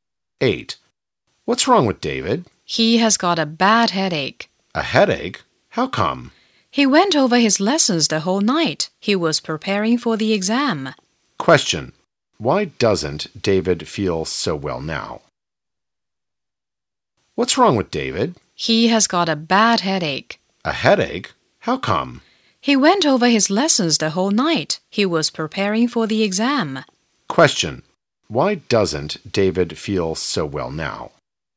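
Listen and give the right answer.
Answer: He went over his lessons the whole night for the exam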